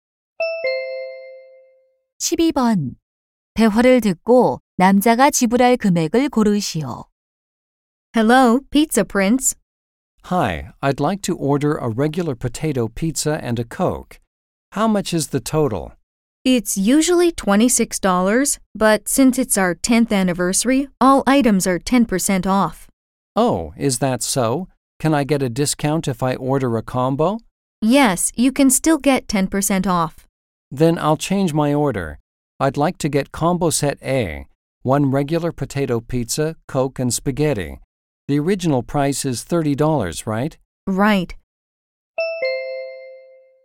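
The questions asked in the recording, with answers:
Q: 대화를 듣고 남자가 지불할 금액을 고르시오.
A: $27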